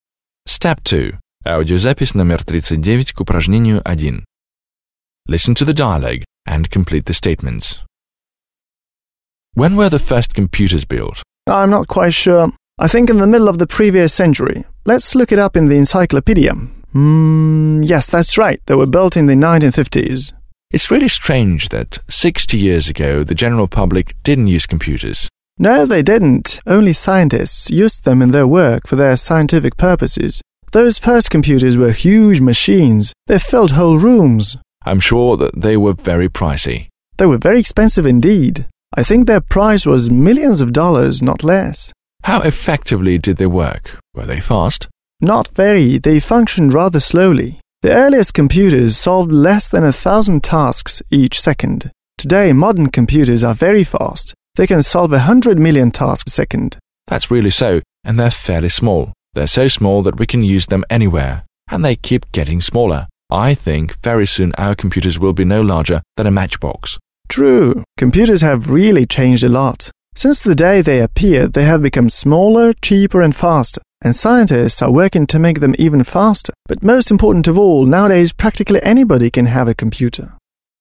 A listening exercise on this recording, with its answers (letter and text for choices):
You will hear two friends speaking about computers. Listen, (39), and complete the following statements (1-4).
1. Andrew and Bob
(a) didn't know exactly when the first computers appeared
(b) found out on the Internet when the first computers appeared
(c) couldn't find out when the first computers appeared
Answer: (a) didn't know exactly when the first computers appeared

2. The friends were surprised that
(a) the first computers were so cheap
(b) nobody used computers in the middle of the previous century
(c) the first computers were used only by few people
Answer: (c) the first computers were used only by few people

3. Bob said that the first computers were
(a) fast and expensive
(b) slow and large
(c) small and slow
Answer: (b) slow and large

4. The friends agreed that computers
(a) have become very simple to operate since the middle of the previous century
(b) will be used in all spheres of our life in the future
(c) have become more effective since the middle of the previous century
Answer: (c) have become more effective since the middle of the previous century

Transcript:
Andrew: When were the first computers built?
Bob: I'm not quite sure. I think in the middle of the previous century. Let's look it up in the encyclopedia. Yes, that's right. They were built in the 1950s.
Andrew: It's really strange that sixty years ago the general public didn't use computers!
Bob: No, they didn't. Only scientists used them in their work for their scientific purposes. Those first computers were huge machines, they filled whole rooms.
Andrew: I'm sure that they were very pricey.
Bob: They were very expensive indeed. I think their price was millions of dollars, not less.
Andrew: How effectively did they work? Were they fast?
Bob: Not very, they functioned rather slowly. The earliest computers solved less than a thousand tasks each second. Today, modern computers are very fast, they can solve a hundred million tasks a second.
Andrew: That's right. And they are fairly small. They are so small that we can use them anywhere. And they keep getting smaller. I think very soon our computers will be no larger than a matchbox.
Bob: True. Computers have really changed a lot. Since the day they appeared they have become smaller, cheaper and faster. And scientists are working to make them even faster. But most important of all, practically anybody can have a computer nowadays.

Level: 9 класс